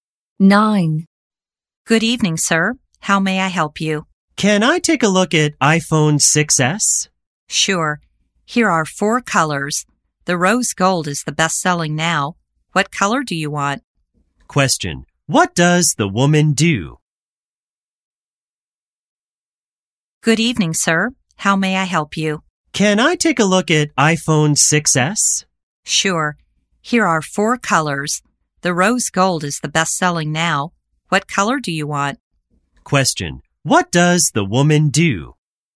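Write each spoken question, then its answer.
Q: Question, what does the woman do?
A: She is a salesclerk (at a phone store)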